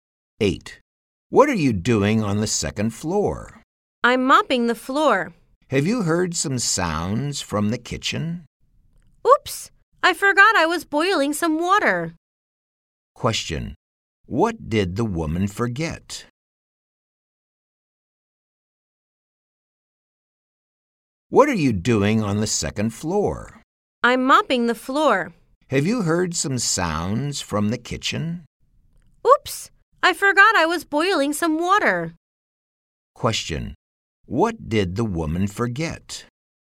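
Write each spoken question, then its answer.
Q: What did the woman forget?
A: She was boiling some water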